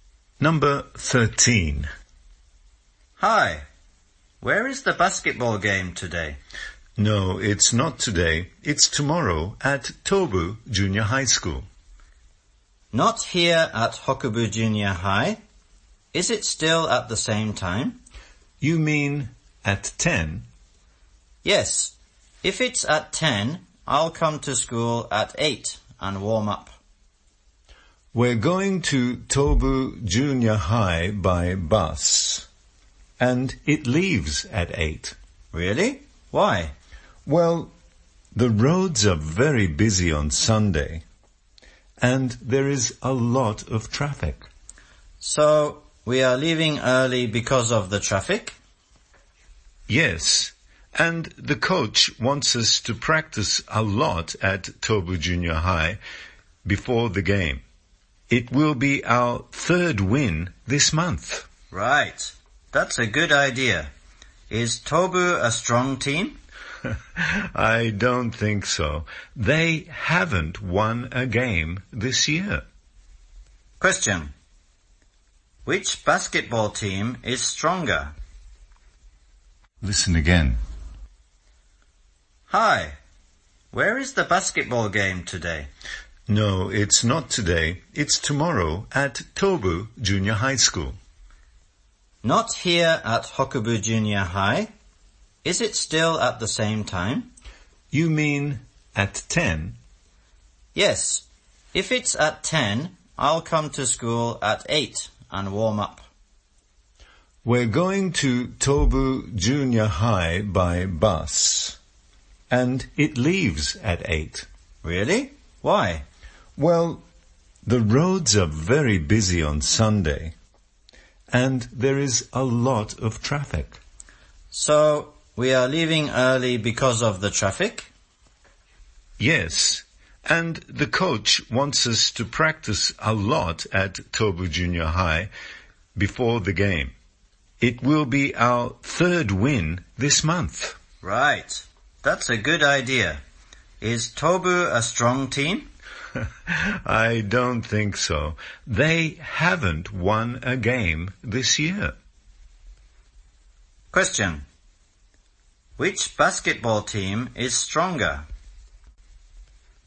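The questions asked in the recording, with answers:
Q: Which basketball team is stronger?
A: Hokubu Junior High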